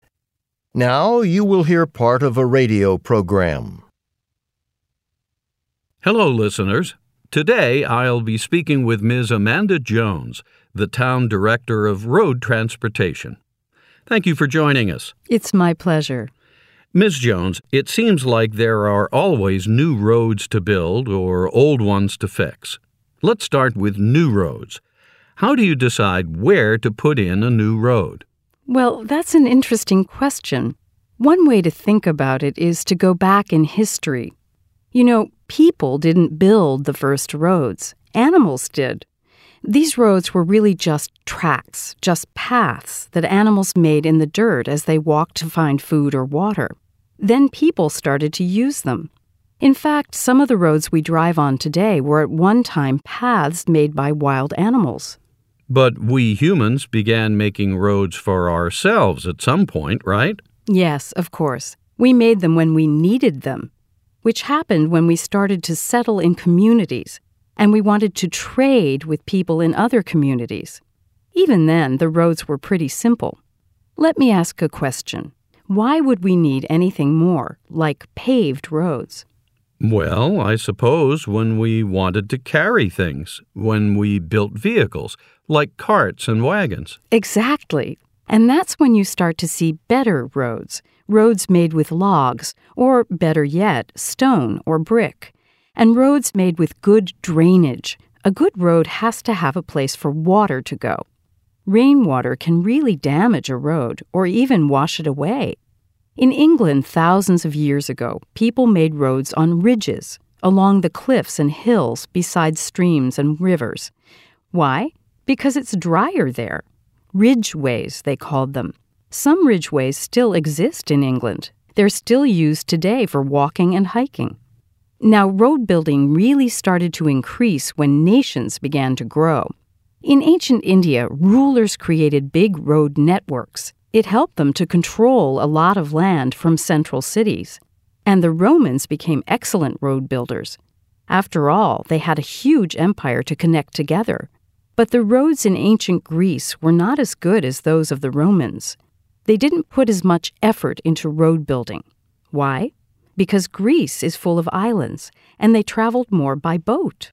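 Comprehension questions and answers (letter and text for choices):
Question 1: Why does the woman talk about animals?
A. To explain how the first roads were created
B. To point out that long ago most people did not travel much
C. To describe an event that happened on a road nearby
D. To suggest that traveling on country roads can be dangerous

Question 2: Why did people in England build ridge ways?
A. To connect small towns to major cities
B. To allow cars to drive around small towns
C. To create roads that water would not wash away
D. To create a separate road for transporting animals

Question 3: What does the woman say about roads in ancient Greece?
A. They were constructed on all of Greece's islands.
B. They were not as good as roads built by the Romans.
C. They often washed away in the rain.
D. They connected Greece to the Roman Empire.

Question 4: What are the speakers mainly talking about?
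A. A new road in their town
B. A new way to build roads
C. The early history of roads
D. The cost of building roads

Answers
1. A. To explain how the first roads were created
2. C. To create roads that water would not wash away
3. B. They were not as good as roads built by the Romans.
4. C. The early history of roads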